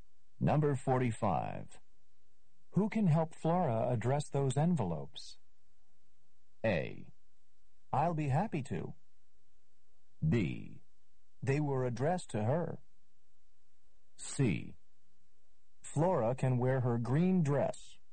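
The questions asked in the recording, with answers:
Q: Who can help Flora address those envelopes?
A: A: I'll be happy to.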